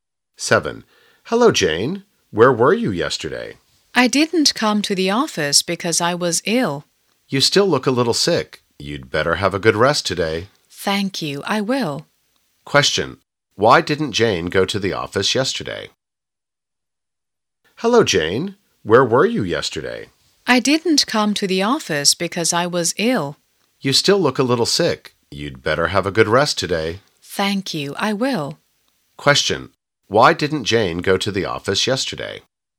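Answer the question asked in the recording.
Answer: Because she was ill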